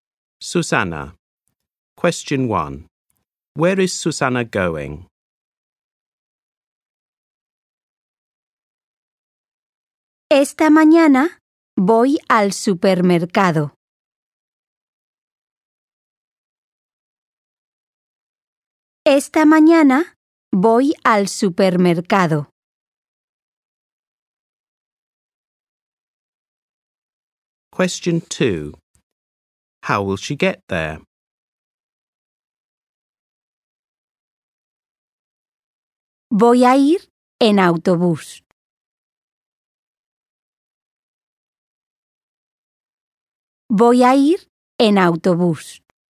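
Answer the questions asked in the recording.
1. To the supermarket
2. By bus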